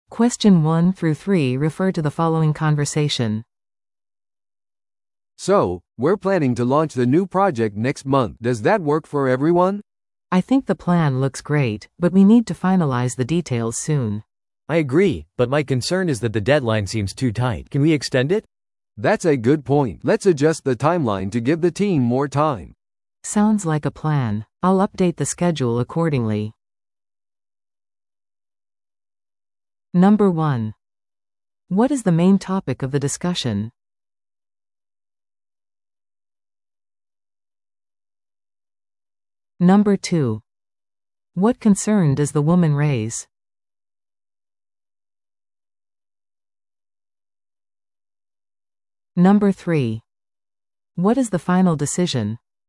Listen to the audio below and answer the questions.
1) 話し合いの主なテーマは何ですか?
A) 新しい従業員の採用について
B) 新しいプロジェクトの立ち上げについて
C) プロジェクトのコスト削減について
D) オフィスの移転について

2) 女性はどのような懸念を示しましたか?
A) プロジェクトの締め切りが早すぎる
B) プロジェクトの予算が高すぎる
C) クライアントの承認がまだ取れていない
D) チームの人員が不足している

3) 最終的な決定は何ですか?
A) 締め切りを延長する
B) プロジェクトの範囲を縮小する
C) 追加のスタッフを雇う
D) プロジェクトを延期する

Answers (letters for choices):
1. B
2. A
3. A

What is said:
A: "So, we're planning to launch the new project next month. Does that work for everyone?"
B: "I think the plan looks great, but we need to finalize the details soon."
C: "I agree, but my concern is that the deadline seems too tight. Can we extend it?"
A: "That's a good point. Let's adjust the timeline to give the team more time."
B: "Sounds like a plan. I'll update the schedule accordingly."